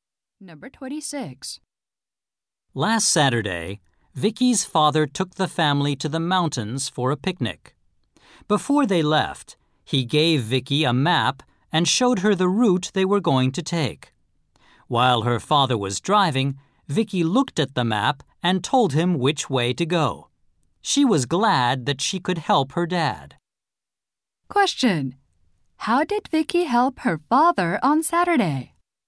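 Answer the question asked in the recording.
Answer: She told him which way to go using the map.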